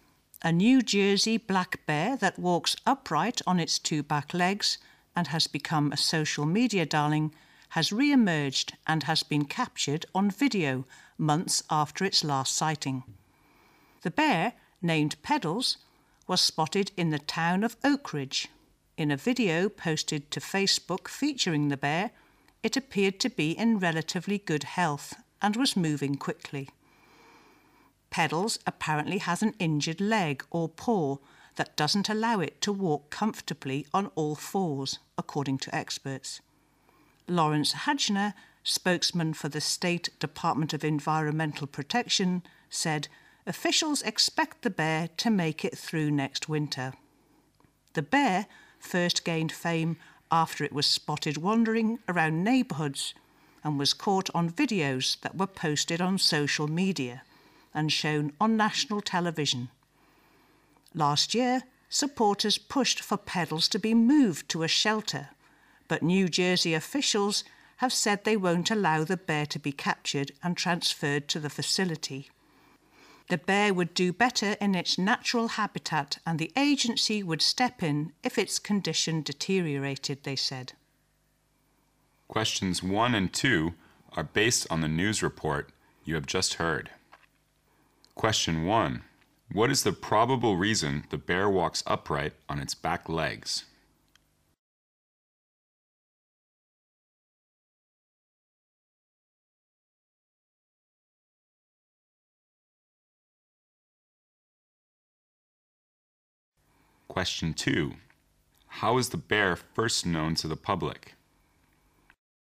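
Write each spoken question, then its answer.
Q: What is the probable reason the bear walks upright on its back legs?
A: It has an injured leg or paw

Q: How is the bear first known to the public?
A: Through videos posted on social media and shown on national television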